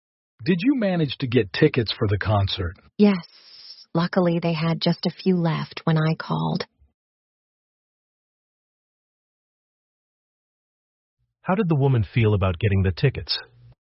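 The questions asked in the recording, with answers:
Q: How did the woman feel about getting the tickets?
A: Lucky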